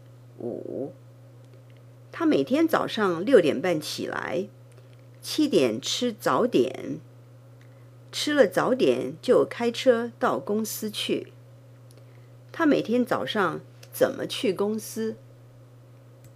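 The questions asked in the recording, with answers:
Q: 他每天早上怎么去公司?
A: 开车去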